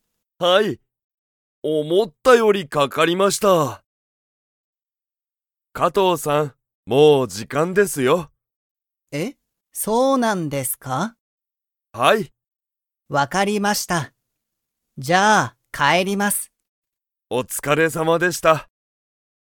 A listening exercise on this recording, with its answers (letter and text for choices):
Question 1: 加藤(かとう)さんは、帰(かえ)りますか?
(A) はい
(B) いいえ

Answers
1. (A) はい

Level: Level 1